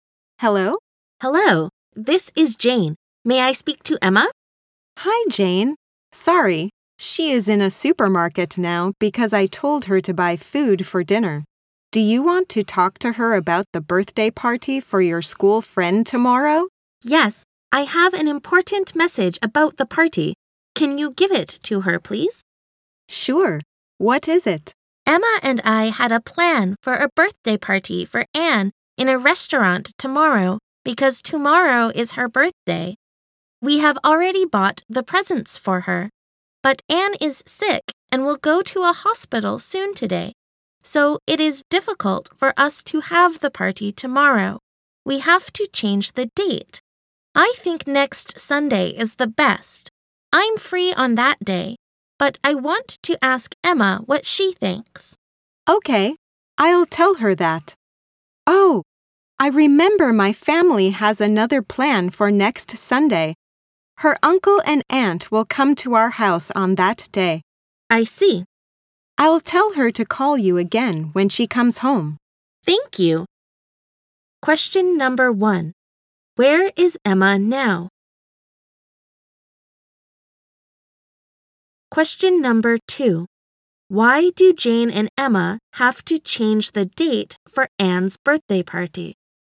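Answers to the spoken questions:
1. In a supermarket.
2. Because Anne is sick and will go to a hospital.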